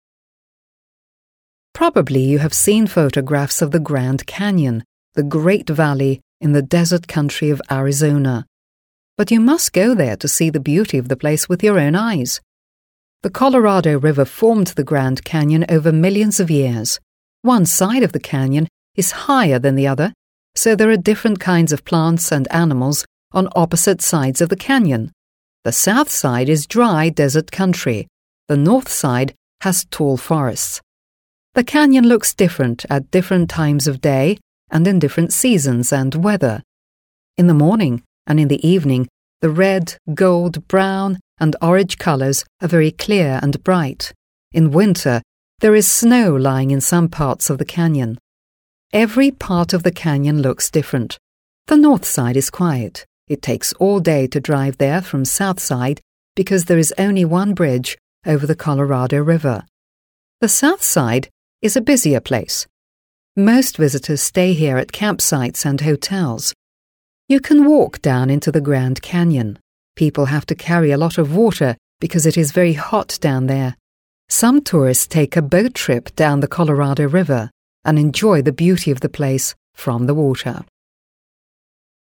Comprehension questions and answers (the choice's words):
1 Listen to the text about the Grand Canyon and complete these sentences.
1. The country where the Grand Canyon is situated is ... .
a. green and grassy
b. wet and rainy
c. dry and empty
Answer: dry and empty

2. The two sides of the Canyon look ... .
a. different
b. the same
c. nearly the same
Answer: different

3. In winter there is ... .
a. no snow in the Grand Canyon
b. a lot of snow in the Grand Canyon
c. snow in some places of the Grand Canyon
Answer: snow in some places of the Grand Canyon

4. The north side of the Canyon is ... .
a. as quiet as the south side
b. quieter than the south side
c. busier than the south side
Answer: quieter than the south side

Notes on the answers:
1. В тексте звучит фраза: «...desert country of Arizona» (пустынная местность Аризоны). Слово desert ['dezət] [дэзэт] означает «пустыня», что напрямую связано с прилагательным dry [draɪ] [драй] — сухой. Варианты про зеленую (green) или дождливую (wet) местность не подходят по смыслу, так как описывается именно пустынный ландшафт. Грамматически здесь используется конструкция is situated (расположен), что является пассивным залогом (Passive Voice).
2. Правильный ответ основывается на предложении из текста: «One side of the canyon is higher than the other, so there are different kinds of plants...». Далее диктор уточняет, что южная сторона — это сухая пустыня, а северная покрыта высокими лесами. Следовательно, стороны выглядят совершенно по-разному (different). Слово different ['dɪfrənt] [дифрэнт] является ключевым для понимания контраста между двумя частями каньона.
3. Этот ответ практически дословно повторяет предложение из аудиозаписи: «In winter, there is snow lying in some parts of the canyon». Словосочетание some parts (некоторые части) синонимично выражению some places (некоторые места) в варианте ответа. Варианты «совсем нет снега» или «много снега везде» были бы неверными, так как текст указывает на наличие снега лишь частично. Здесь использована конструкция there is, указывающая на наличие чего-либо в определенном месте.
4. В тексте сказано: «The north side is quiet» (Северная сторона тихая) и «The south side is a busier place» (Южная сторона — более оживленное место). Чтобы выбрать правильный ответ, нужно применить правило сравнения прилагательных. Если юг более оживленный (busier), значит, север — более тихий. Мы используем сравнительную степень прилагательного quietquieter ['kwaɪətə] [квайэтэ] (тише) в сочетании с союзом than (чем).

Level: 7 класс